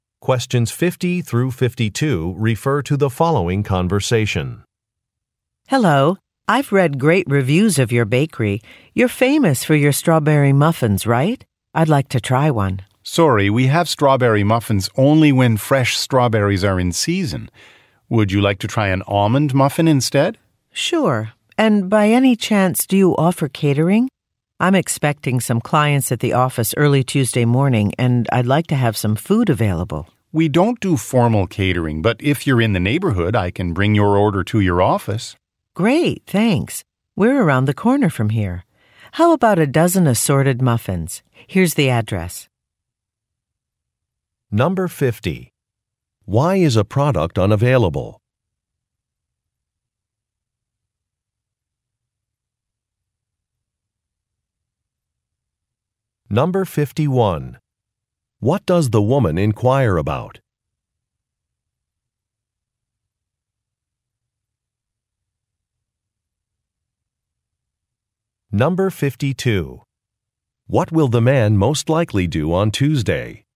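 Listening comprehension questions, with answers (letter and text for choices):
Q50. Why is a product unavailable?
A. A machine part is broken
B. An ingredient is not in season.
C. A shipment was delayed.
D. A manufacturer went out of business.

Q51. What does the woman inquire about?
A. The date of an event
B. The recipe for some baked goods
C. The availability of a catering service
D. The location of a business meeting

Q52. What will the man most likely do on Tuesday?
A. Change a display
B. Buy some supplies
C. Close a shop early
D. Make a delivery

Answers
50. B. An ingredient is not in season.
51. C. The availability of a catering service
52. D. Make a delivery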